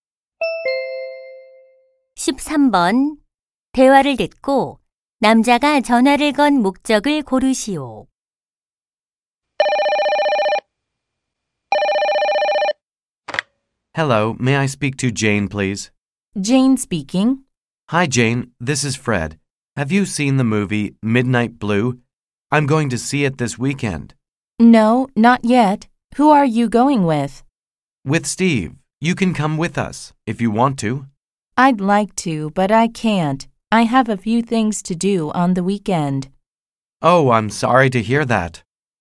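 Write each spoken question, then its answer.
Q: 대화를 듣고 남자가 전화를 건 목적을 고르시오.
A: 영화를 함께 보자고 제안하려고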